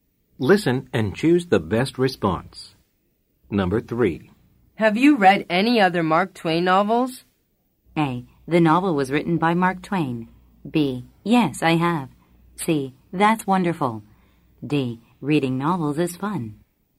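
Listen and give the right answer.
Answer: B: Yes, I have.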